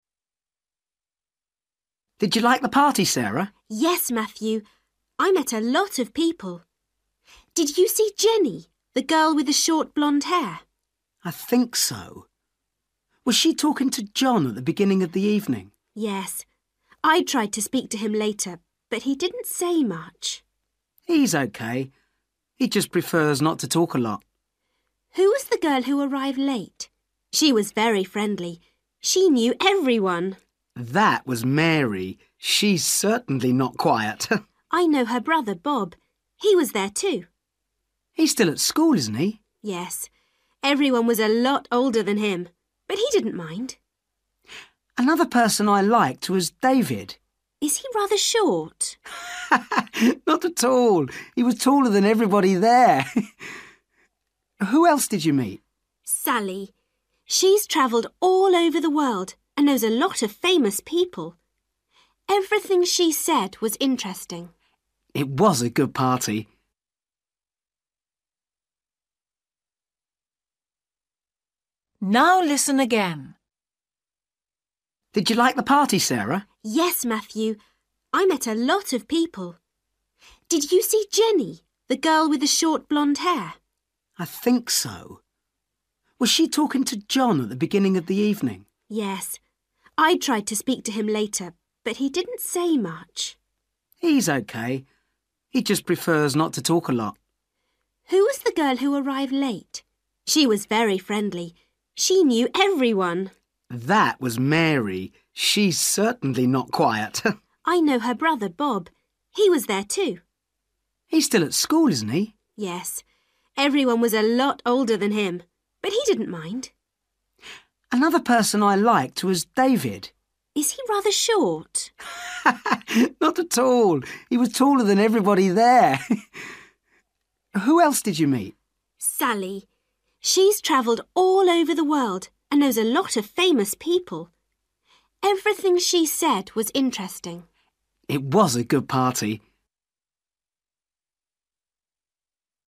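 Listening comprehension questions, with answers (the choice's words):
For each question, choose the correct answer.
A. blonde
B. famous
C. friendly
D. interesting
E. quiet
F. short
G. tall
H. young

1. John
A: quiet

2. Mary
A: friendly

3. Bob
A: young

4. David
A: tall

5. Sally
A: interesting

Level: Luyện nghe trình độ A2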